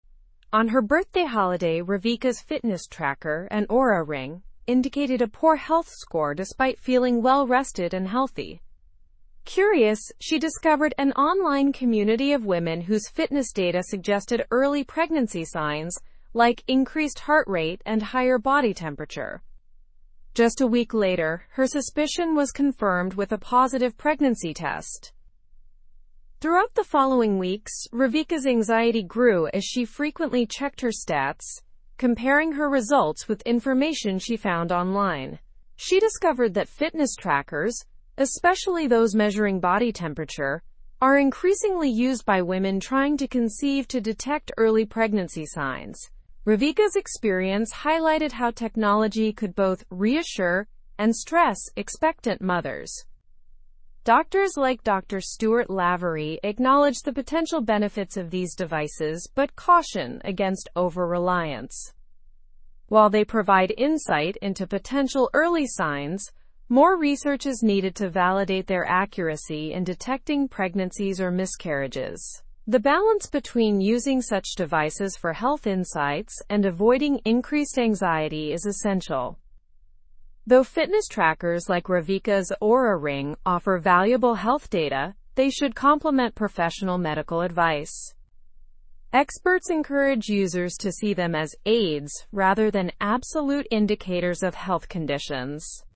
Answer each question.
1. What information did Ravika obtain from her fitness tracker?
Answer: She obtained a poor health score despite feeling well.

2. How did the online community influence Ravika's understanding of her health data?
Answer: It suggested that her fitness data might indicate early pregnancy signs.

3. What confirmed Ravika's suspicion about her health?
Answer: A positive pregnancy test confirmed her suspicion.

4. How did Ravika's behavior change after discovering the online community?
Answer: She frequently checked her stats and compared them with online information.

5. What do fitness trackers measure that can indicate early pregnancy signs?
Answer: They measure increased heart rate and higher body temperature.

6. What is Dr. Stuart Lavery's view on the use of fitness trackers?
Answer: He sees potential benefits but warns against over-reliance without further research.

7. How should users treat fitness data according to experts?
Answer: As aids rather than absolute indicators of health conditions.

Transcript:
On her birthday holiday, Ravika's fitness tracker, an Oura ring, indicated a poor health score despite feeling well-rested and healthy. Curious, she discovered an online community of women whose fitness data suggested early pregnancy signs like increased heart rate and higher body temperature. Just a week later, her suspicion was confirmed with a positive pregnancy test.
Throughout the following weeks, Ravika's anxiety grew as she frequently checked her stats, comparing her results with information she found online. She discovered that fitness trackers, especially those measuring body temperature, are increasingly used by women trying to conceive to detect early pregnancy signs. Ravika's experience highlighted how technology could both reassure and stress expectant mothers.
Doctors like Dr. Stuart Lavery acknowledge the potential benefits of these devices but caution against over-reliance. While they provide insight into potential early signs, more research is needed to validate their accuracy in detecting pregnancies or miscarriages. The balance between using such devices for health insights and avoiding increased anxiety is essential.
Though fitness trackers like Ravika's Oura ring offer valuable health data, they should complement professional medical advice. Experts encourage users to see them as aids rather than absolute indicators of health conditions.

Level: Level 3